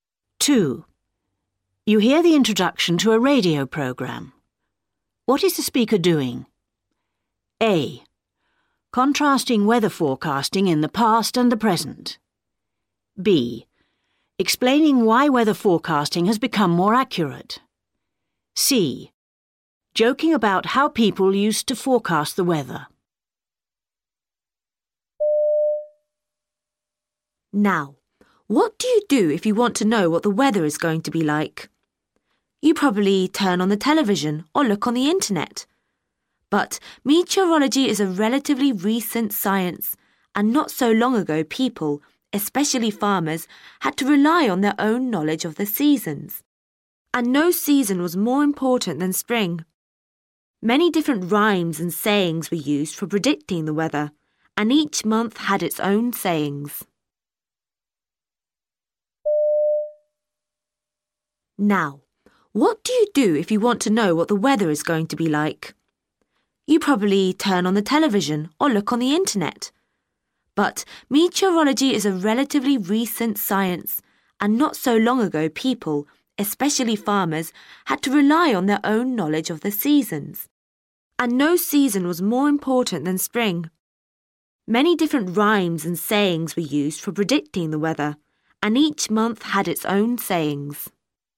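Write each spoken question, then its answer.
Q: What is the speaker doing?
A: A: Contrasting weather forecasting in the past and the present.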